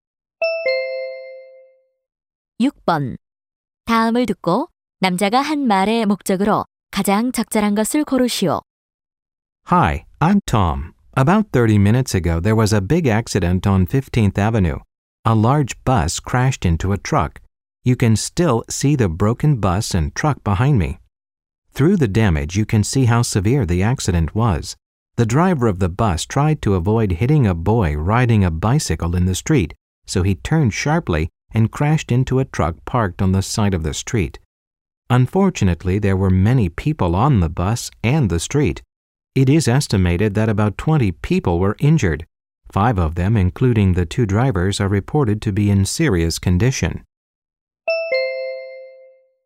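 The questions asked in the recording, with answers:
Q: 다음을 듣고 남자가 한 말의 목적으로 가장 적절한 것을 고르시오.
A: 교통사고 소식 보도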